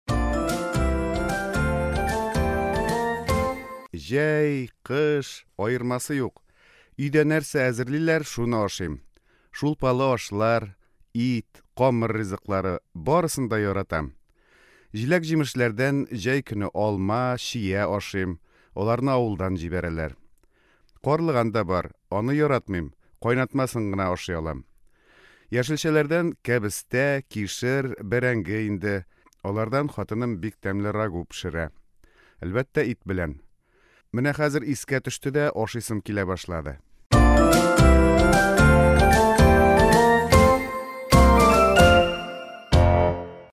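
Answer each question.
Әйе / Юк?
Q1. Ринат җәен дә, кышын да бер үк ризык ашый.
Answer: Әйе

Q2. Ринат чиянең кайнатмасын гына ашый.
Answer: Юк

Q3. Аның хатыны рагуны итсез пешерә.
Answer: Юк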